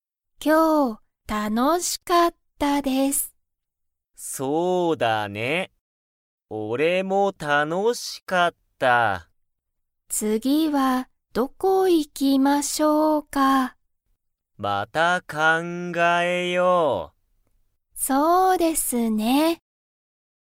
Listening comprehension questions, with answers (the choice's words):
トシキも楽(たの)しかったですか?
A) はい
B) いいえ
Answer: はい

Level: Level 1